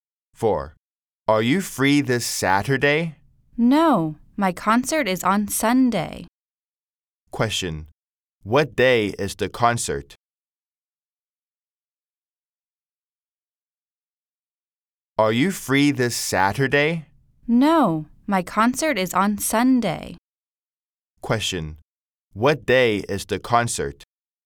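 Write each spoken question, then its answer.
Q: Question, what day is the concert?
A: Sunday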